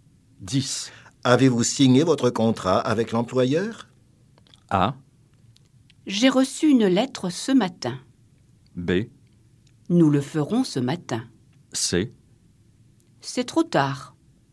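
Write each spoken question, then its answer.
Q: Avez-vous signé votre contrat avec l'employeur?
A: B: Nous le ferons ce matin.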